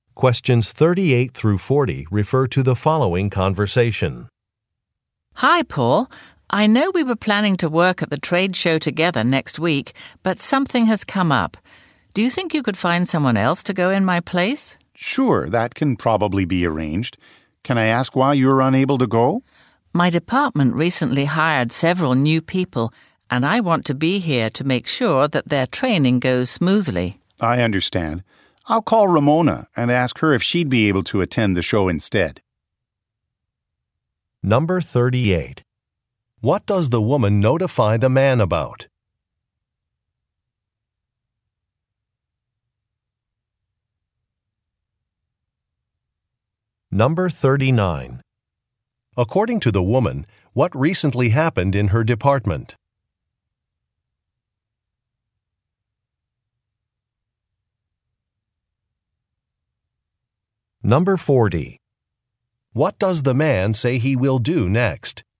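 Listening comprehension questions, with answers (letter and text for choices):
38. What does the woman notify the man about?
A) She is unable to meet a deadline.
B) She needs a replacement laptop.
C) She cannot attend a business trip.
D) She is planning to give a speech.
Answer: C) She cannot attend a business trip.

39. According to the woman, what recently happened in her department?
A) A corporate policy was updated.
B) A supply order was mishandled.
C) Client contracts were renewed.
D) New employees were hired.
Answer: D) New employees were hired.

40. What does the man say he will do next?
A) Speak with a colleague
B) Conduct an interview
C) Calculate a budget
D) Draft a travel itinerary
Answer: A) Speak with a colleague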